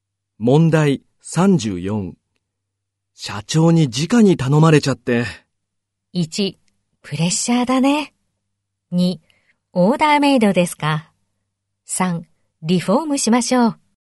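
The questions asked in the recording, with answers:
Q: 社長に直に頼まれちゃって。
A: 1: プレッシャーだね。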